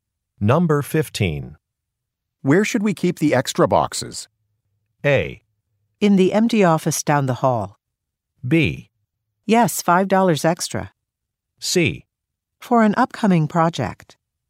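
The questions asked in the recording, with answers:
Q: Where should we keep the extra boxes?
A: A: In the empty office down the hall.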